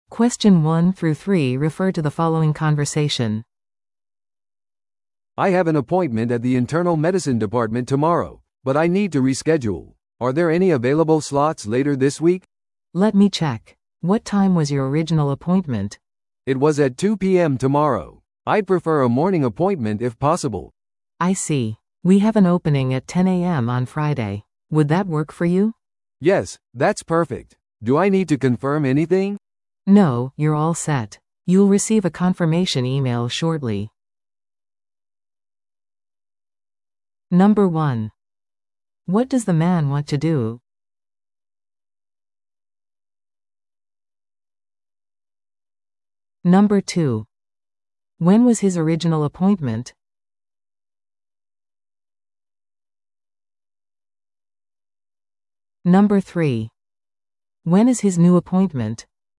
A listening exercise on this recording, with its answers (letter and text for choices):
Listen to the audio below and answer the questions.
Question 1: What does the man want to do?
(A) 予約をキャンセルする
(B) 予約を変更する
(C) 診療科を変更する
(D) 訪問診療を依頼する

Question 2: When was his original appointment?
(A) 月曜日の午前9時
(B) 火曜日の午後2時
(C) 木曜日の午前10時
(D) 金曜日の午後3時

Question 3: When is his new appointment?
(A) 水曜日の午前11時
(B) 金曜日の午前10時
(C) 土曜日の午後1時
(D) 日曜日の午後4時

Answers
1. (B) 予約を変更する
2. (B) 火曜日の午後2時
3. (B) 金曜日の午前10時

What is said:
A: "I have an appointment at the internal medicine department tomorrow, but I need to reschedule. Are there any available slots later this week?"
B: "Let me check. What time was your original appointment?"
A: "It was at 2 PM tomorrow. I'd prefer a morning appointment if possible."
B: "I see. We have an opening at 10 AM on Friday. Would that work for you?"
A: "Yes, that's perfect. Do I need to confirm anything?"
B: "No, you're all set. You'll receive a confirmation email shortly."